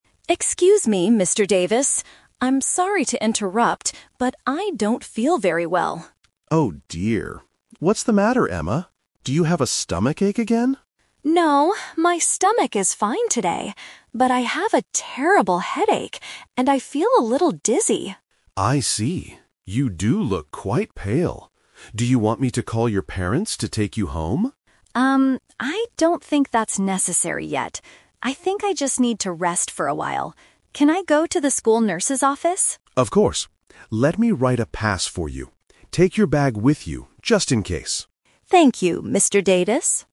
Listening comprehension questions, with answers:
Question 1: What is the matter with Emma today?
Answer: She has a terrible headache.

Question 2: What does Mr. Davis offer to do for Emma?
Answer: Call her parents.

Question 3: Where is Emma going to go now?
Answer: To the nurse's office

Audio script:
Emma: Excuse me, Mr. Davis? I'm sorry to interrupt, but I don't feel very well.
Mr. Davis: Oh dear. What's the matter, Emma? Do you have a stomachache again?
Emma: No, my stomach is fine today. But I have a terrible headache, and I feel a little dizzy.
Mr. Davis: I see. You do look quite pale. Do you want me to call your parents to take you home?
I don't think that's necessary yet. I think I just need to rest for a while. Can I go to the school nurse's office?
Mr. Davis: Of course. Let me write a pass for you. Take your bag with you, just in case.